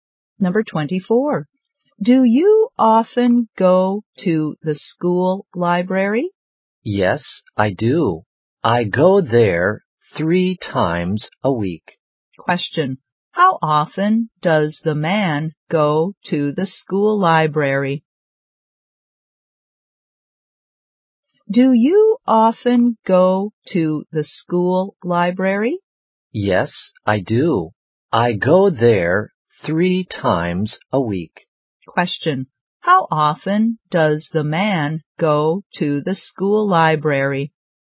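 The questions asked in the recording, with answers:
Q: How often does the man go to the school library?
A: Three times a week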